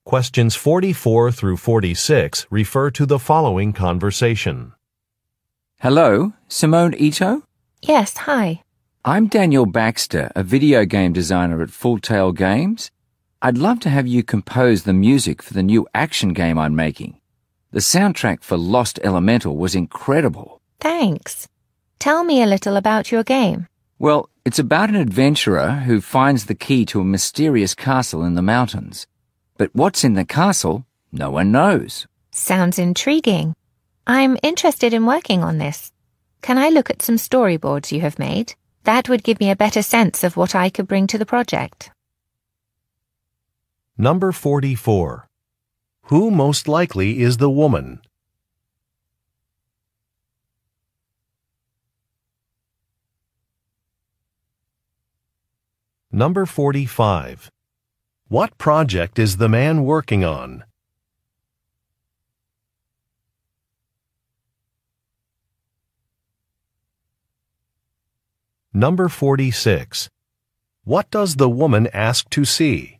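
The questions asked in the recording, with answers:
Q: Who most likely is the woman?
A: A music composer

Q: What project is the man working on?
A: A new action video game

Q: What does the woman ask to see?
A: Some storyboards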